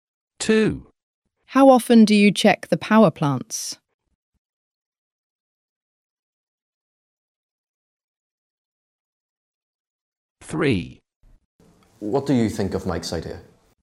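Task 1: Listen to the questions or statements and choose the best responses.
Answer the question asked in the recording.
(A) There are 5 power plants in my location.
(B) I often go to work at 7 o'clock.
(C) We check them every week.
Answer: (C) We check them every week.

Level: A2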